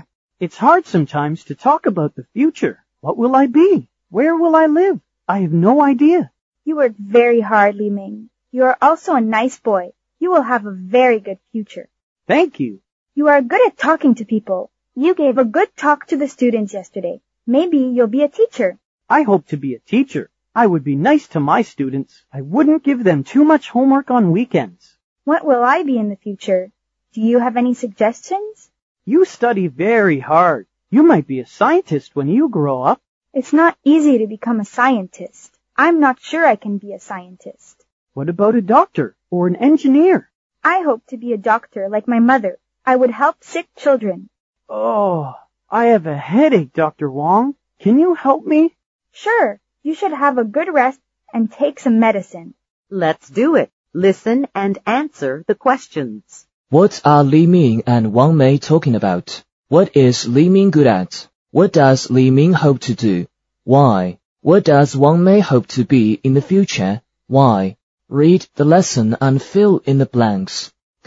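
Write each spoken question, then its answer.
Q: What are Li Ming and Wang Mei talking about?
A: Their future jobs

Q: What is Li Ming good at?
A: Talking to people

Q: What does Li Ming hope to do? Why?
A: Be a teacher, because he is good at talking to people and would be nice to his students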